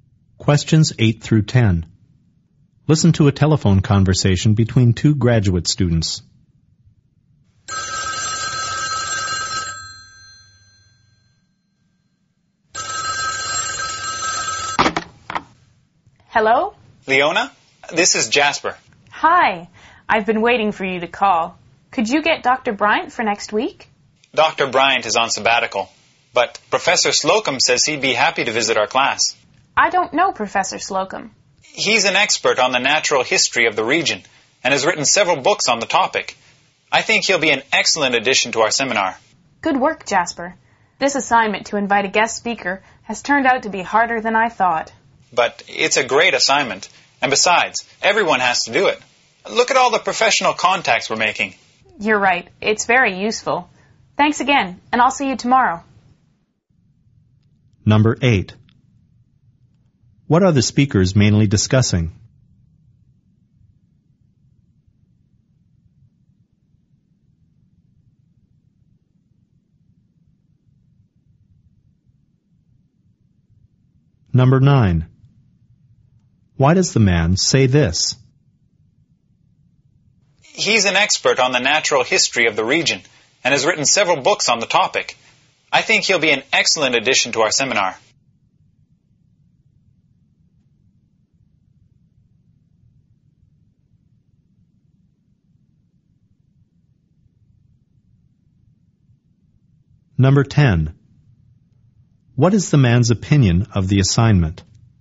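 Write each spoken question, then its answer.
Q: What are the speakers mainly discussing?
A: Inviting a guest speaker to their seminar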